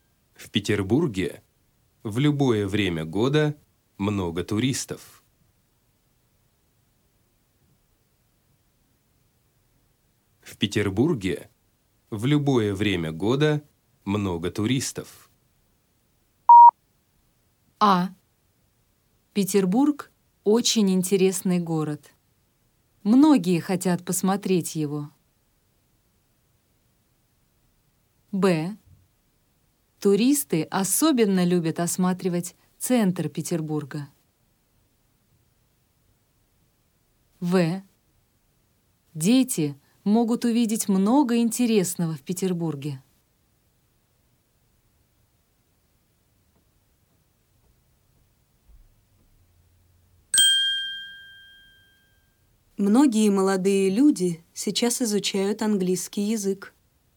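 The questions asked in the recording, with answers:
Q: В Петербурге в любое время года много туристов.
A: А: Петербург – очень интересный город. Многие хотят посмотреть его.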